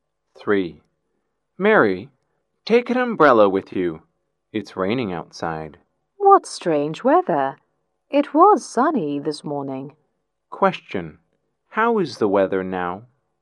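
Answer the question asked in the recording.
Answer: It's raining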